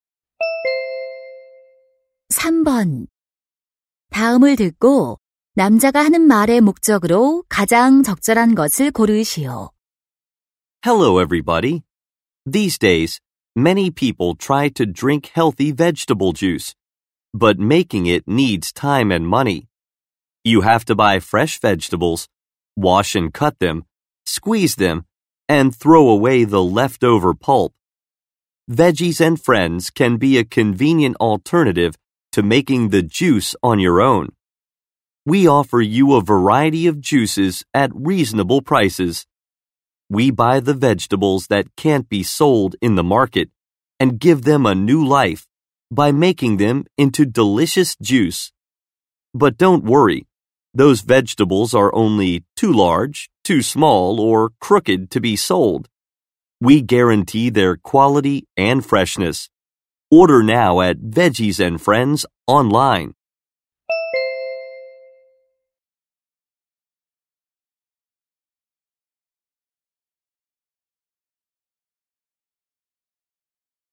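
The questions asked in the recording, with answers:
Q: 다음을 듣고 남자가 하는 말의 목적으로 가장 적절한 것을 고르시오.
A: Veggies and Friends 채소 주스를 광고하려고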